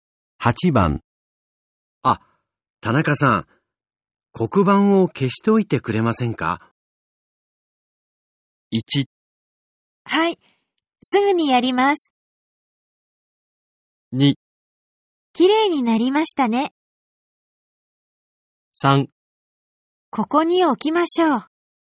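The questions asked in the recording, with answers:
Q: あ、田中さん、黒板を消しておいてくれませんか?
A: 1: はい、すぐにやります。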